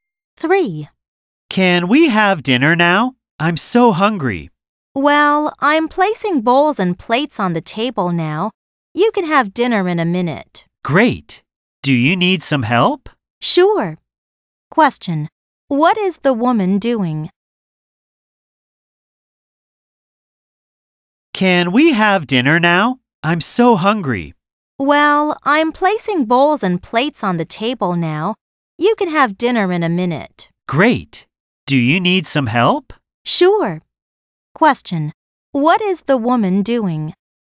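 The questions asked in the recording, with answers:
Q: What is the woman doing?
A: Placing bowls and plates on the table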